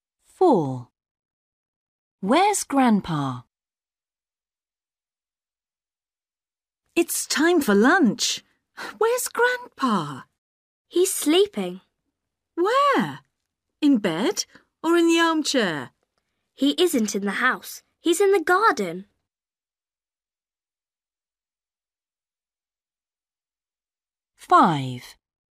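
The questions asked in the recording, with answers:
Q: Where's Grandpa?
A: in the garden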